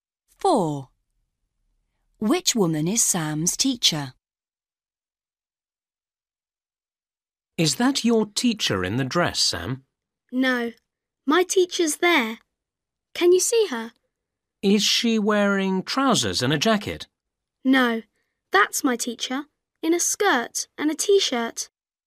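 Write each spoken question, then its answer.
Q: Which woman is Sam's teacher?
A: The one in a skirt and a t-shirt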